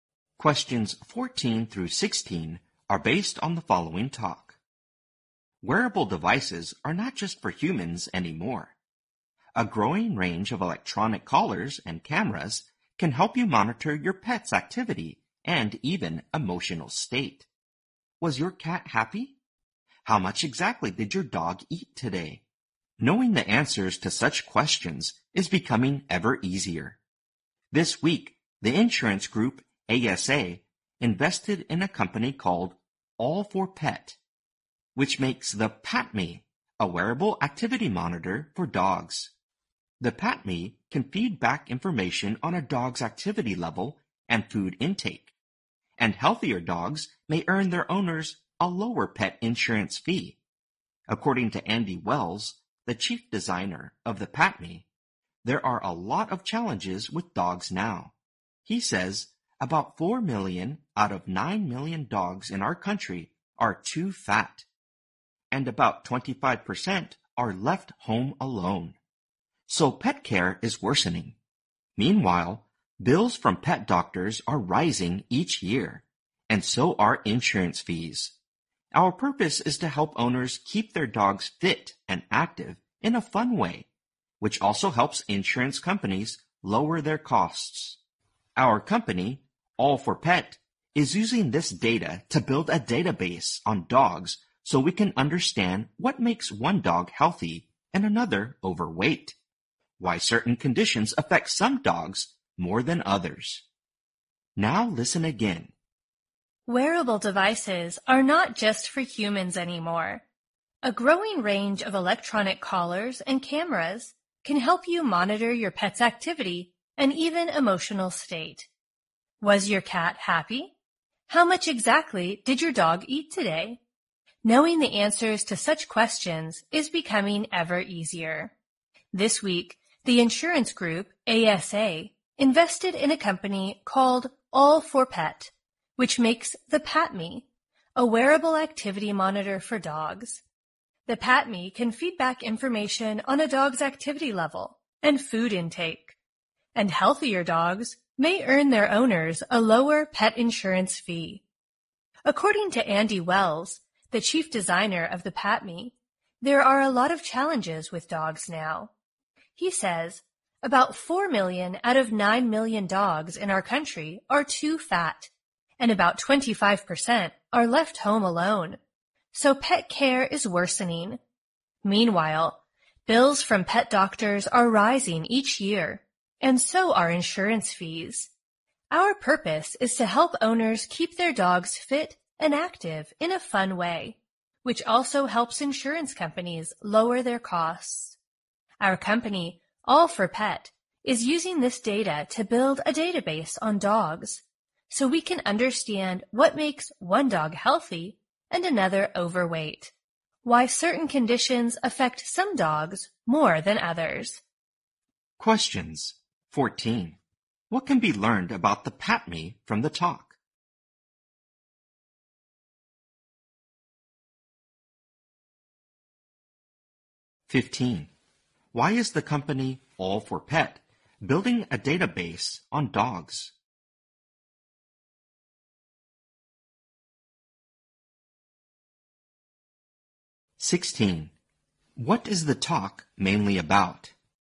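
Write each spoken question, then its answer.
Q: What can be learned about the PatMe from the talk?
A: It monitors a dog's activity level and food intake.

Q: Why is the company All for Pet building a database on dogs?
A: To understand what makes dogs healthy or overweight

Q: What is the talk mainly about?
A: Wearable devices for pets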